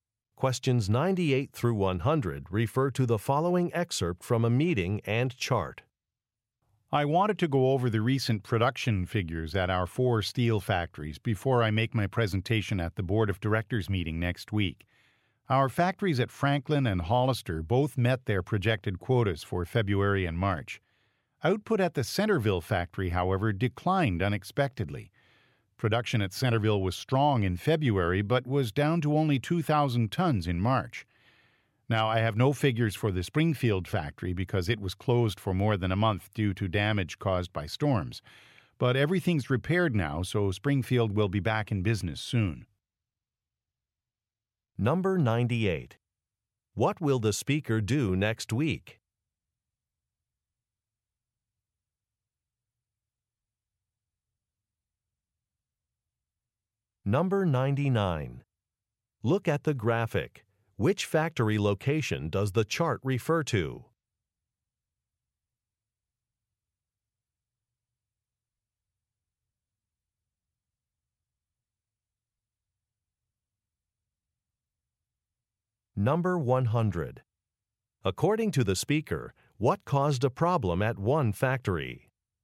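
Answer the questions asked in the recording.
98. Give a presentation at the Board of Directors meeting
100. Storm damage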